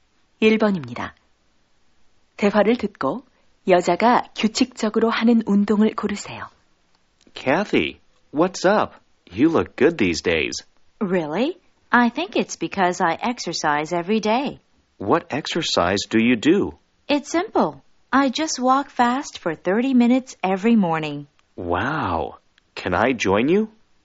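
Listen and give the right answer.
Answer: 빨리 걷기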